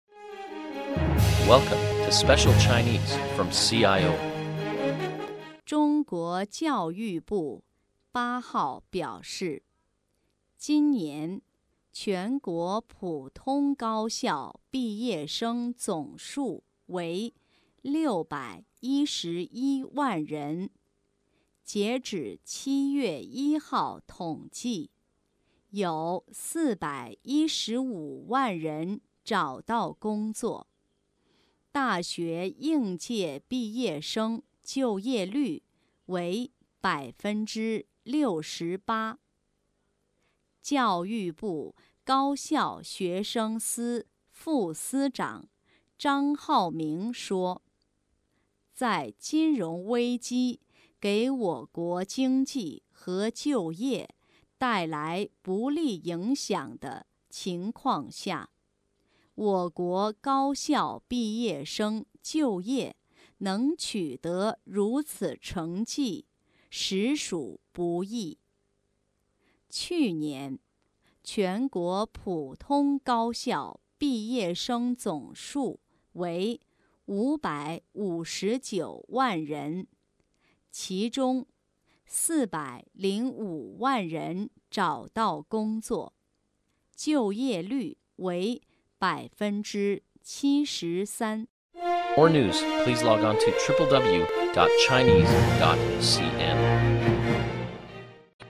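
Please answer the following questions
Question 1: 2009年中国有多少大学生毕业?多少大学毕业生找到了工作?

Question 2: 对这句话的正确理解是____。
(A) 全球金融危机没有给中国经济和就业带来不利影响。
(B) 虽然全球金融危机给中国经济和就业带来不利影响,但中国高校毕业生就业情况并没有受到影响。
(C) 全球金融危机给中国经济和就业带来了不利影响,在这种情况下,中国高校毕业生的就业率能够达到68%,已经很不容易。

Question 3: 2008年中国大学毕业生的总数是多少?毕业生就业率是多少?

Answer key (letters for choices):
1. 611万人毕业,415万人找到工作
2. C
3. 559万人,就业率73%

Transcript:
Topic 中国大学应届毕业生就业率为68%
教育部高校学生司副司长张浩明说:"在金融危机给我国经济和就业带来不利影响的情况下,我国高校毕业生就业能取得如此成绩实属不易。"

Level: M.Phil Year 2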